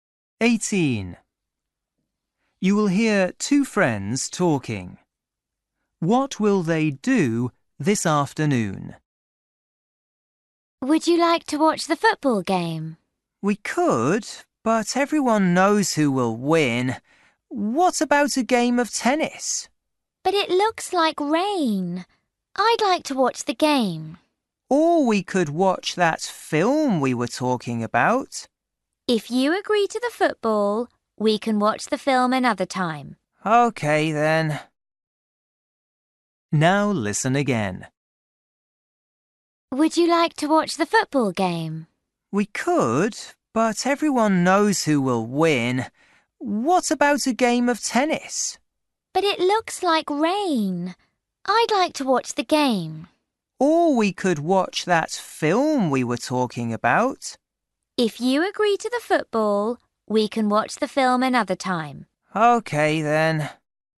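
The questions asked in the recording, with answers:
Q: What will they do this afternoon?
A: watch the football game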